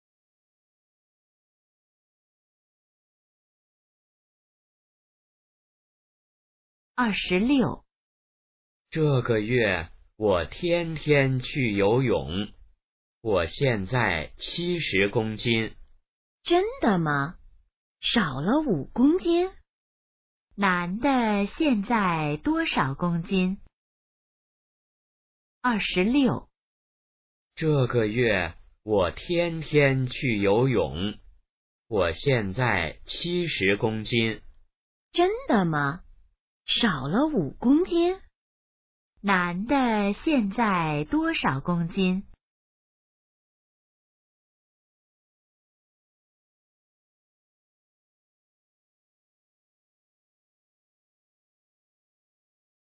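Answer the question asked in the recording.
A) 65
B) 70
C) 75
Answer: B) 70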